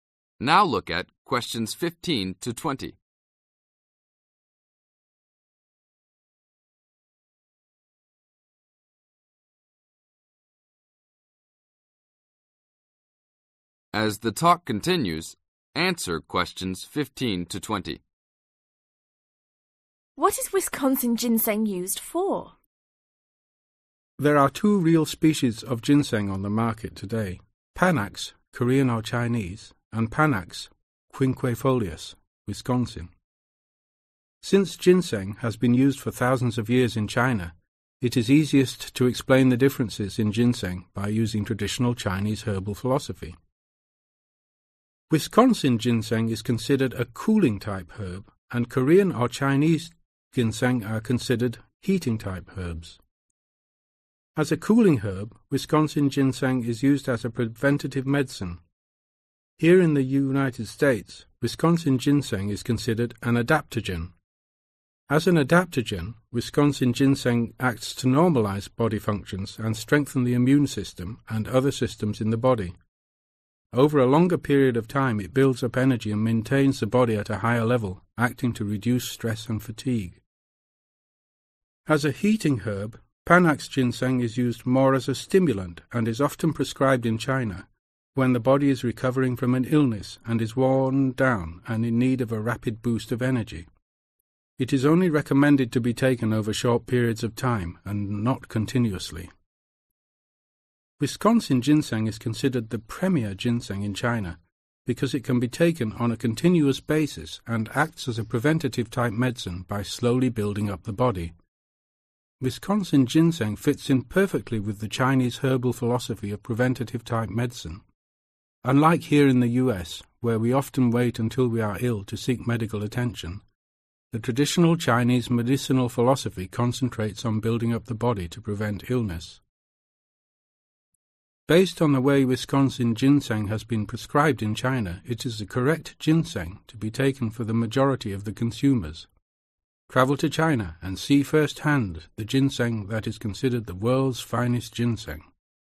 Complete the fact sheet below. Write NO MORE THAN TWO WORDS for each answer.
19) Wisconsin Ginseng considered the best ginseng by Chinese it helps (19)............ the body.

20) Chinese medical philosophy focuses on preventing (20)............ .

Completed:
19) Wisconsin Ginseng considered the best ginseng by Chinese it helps Build up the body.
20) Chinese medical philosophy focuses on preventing Illness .